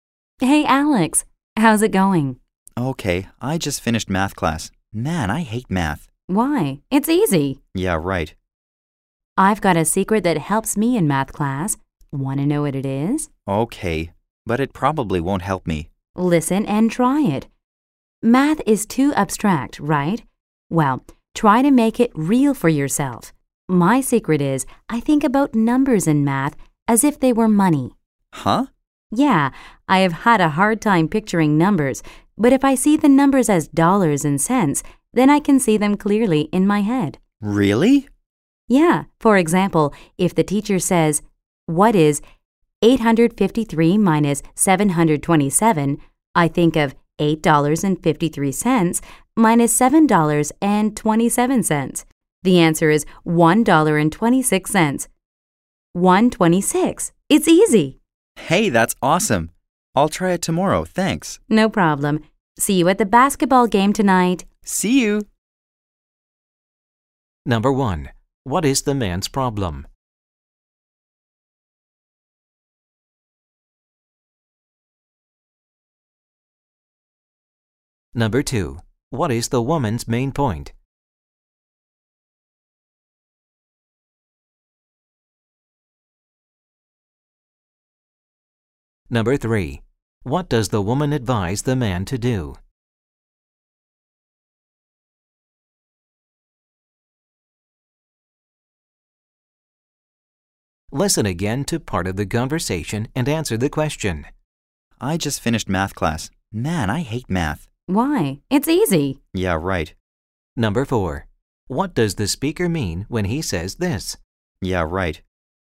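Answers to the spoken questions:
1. He hates math / finds it hard
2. Thinking of numbers as money makes math easier
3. Think of numbers as dollars and cents to make math real
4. He doesn't think math is easy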